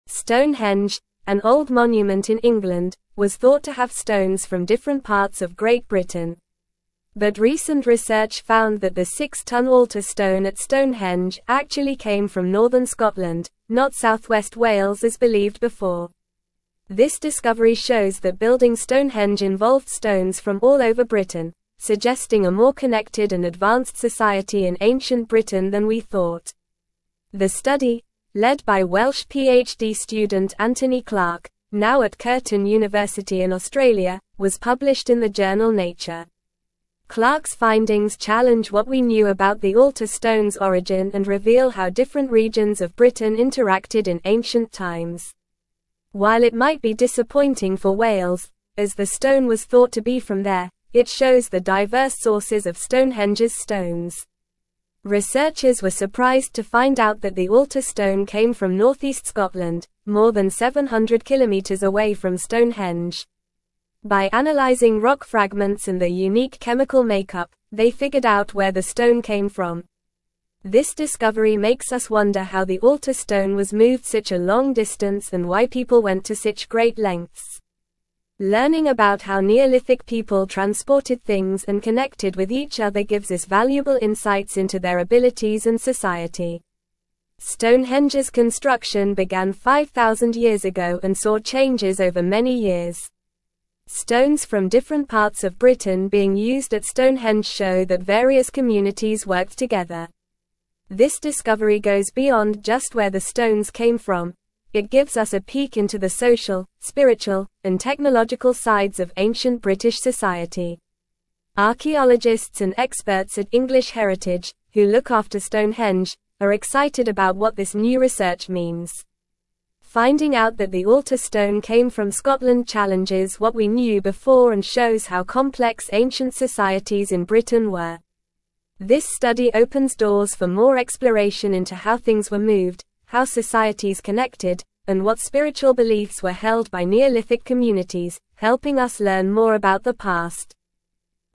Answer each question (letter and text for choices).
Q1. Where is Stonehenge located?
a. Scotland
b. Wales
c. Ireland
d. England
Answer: d. England

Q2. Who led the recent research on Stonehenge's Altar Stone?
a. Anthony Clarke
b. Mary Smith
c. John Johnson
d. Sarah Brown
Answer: a. Anthony Clarke

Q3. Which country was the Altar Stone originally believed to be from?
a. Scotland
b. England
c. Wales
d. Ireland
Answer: c. Wales

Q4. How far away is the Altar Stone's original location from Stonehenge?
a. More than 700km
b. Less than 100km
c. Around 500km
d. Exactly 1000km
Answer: a. More than 700km

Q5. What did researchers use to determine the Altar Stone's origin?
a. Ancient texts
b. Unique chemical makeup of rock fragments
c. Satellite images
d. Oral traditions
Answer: b. Unique chemical makeup of rock fragments

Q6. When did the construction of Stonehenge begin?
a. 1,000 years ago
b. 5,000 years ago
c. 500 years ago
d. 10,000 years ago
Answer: b. 5,000 years ago

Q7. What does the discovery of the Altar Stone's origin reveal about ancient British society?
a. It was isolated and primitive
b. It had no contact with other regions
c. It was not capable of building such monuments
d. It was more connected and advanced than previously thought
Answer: d. It was more connected and advanced than previously thought

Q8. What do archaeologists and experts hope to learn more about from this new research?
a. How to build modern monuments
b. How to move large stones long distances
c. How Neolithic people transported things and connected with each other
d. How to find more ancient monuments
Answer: c. How Neolithic people transported things and connected with each other

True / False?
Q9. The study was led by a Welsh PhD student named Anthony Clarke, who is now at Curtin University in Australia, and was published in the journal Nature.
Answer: True

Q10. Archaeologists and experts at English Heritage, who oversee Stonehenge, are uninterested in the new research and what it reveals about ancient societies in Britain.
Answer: False

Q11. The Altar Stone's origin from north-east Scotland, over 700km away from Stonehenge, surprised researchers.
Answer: True

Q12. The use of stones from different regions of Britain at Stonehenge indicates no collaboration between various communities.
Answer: False

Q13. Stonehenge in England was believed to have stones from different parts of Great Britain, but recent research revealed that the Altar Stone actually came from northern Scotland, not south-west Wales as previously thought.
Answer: True

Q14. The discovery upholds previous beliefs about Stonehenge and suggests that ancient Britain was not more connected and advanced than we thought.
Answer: False

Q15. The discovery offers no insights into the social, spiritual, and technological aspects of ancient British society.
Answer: False

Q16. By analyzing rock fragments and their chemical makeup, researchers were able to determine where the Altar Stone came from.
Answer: True

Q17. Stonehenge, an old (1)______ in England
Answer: monument

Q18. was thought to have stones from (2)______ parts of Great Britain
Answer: different

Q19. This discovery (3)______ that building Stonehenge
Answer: shows

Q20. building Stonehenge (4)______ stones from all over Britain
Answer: involved

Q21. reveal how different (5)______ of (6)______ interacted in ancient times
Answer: regions

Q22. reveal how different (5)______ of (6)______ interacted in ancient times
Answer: Britain

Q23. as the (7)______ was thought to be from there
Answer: stone

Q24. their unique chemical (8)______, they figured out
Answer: makeup

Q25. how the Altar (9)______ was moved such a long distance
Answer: Stone

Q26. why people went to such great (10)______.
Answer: lengths

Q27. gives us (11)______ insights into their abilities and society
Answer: valuable

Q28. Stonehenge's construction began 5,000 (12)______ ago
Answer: years

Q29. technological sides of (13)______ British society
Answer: ancient

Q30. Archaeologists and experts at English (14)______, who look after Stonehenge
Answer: Heritage

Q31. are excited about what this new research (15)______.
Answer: means

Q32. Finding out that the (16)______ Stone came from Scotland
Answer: Altar

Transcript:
Stonehenge, an old monument in England, was thought to have stones from different parts of Great Britain. But recent research found that the six-tonne Altar Stone at Stonehenge actually came from northern Scotland, not south-west Wales as believed before. This discovery shows that building Stonehenge involved stones from all over Britain, suggesting a more connected and advanced society in ancient Britain than we thought.
The study, led by Welsh PhD student Anthony Clarke, now at Curtin University in Australia, was published in the journal Nature. Clarke's findings challenge what we knew about the Altar Stone's origin and reveal how different regions of Britain interacted in ancient times. While it might be disappointing for Wales, as the stone was thought to be from there, it shows the diverse sources of Stonehenge's stones.
Researchers were surprised to find out that the Altar Stone came from north-east Scotland, more than 700km away from Stonehenge. By analyzing rock fragments and their unique chemical makeup, they figured out where the stone came from. This discovery makes us wonder how the Altar Stone was moved such a long distance and why people went to such great lengths. Learning about how Neolithic people transported things and connected with each other gives us valuable insights into their abilities and society.
Stonehenge's construction began 5,000 years ago and saw changes over many years. Stones from different parts of Britain being used at Stonehenge show that various communities worked together. This discovery goes beyond just where the stones came from; it gives us a peek into the social, spiritual, and technological sides of ancient British society. Archaeologists and experts at English Heritage, who look after Stonehenge, are excited about what this new research means. Finding out that the Altar Stone came from Scotland challenges what we knew before and shows how complex ancient societies in Britain were. This study opens doors for more exploration into how things were moved, how societies connected, and what spiritual beliefs were held by Neolithic communities, helping us learn more about the past.

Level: Level 3